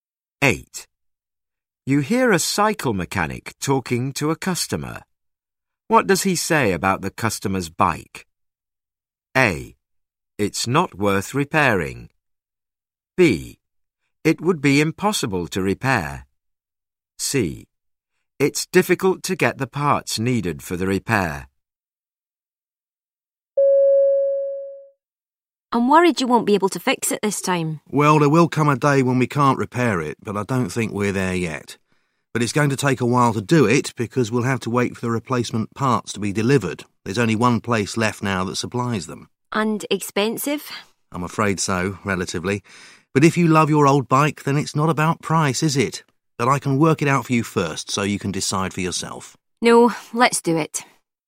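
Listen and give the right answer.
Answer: C: It's difficult to get the parts needed for the repair.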